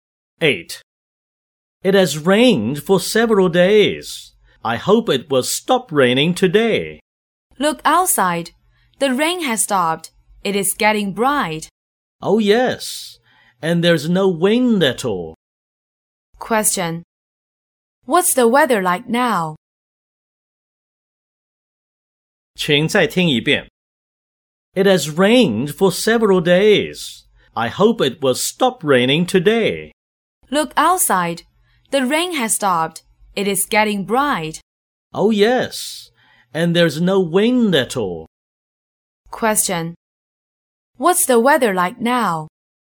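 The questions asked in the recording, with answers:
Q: What's the weather like now?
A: The rain has stopped; it is getting bright with no wind.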